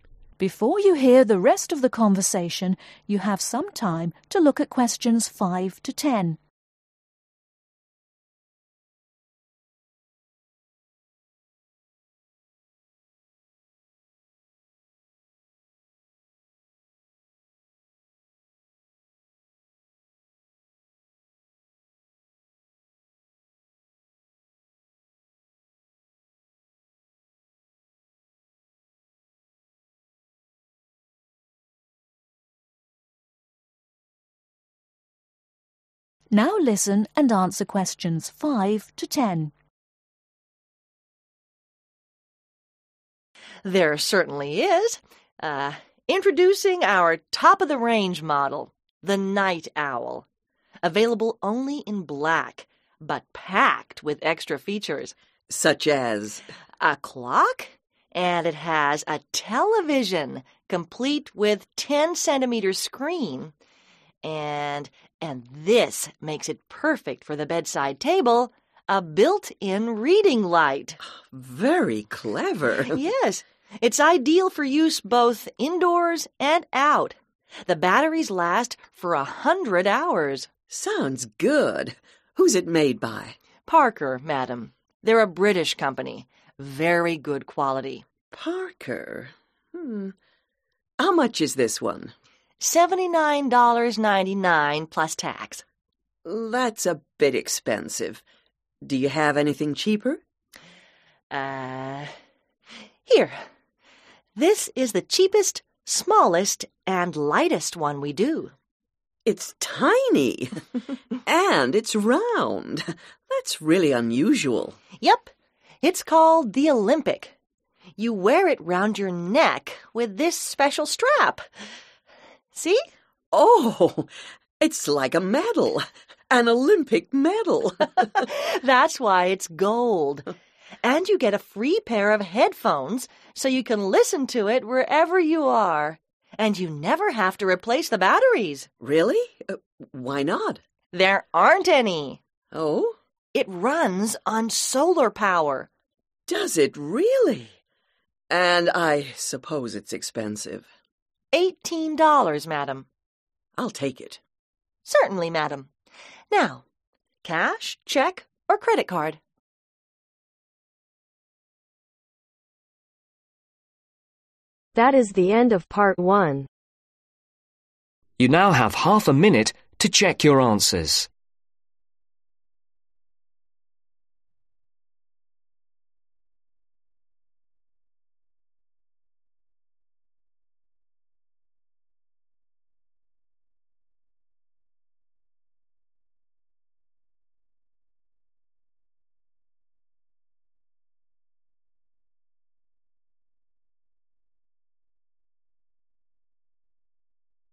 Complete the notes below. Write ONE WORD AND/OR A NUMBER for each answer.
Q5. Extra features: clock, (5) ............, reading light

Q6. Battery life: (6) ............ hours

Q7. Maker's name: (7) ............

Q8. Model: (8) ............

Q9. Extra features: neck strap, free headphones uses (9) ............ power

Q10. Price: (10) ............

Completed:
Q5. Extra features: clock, television/TV, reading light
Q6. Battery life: 100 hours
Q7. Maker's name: Parker
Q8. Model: Olympic
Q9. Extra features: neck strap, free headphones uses solar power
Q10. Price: 18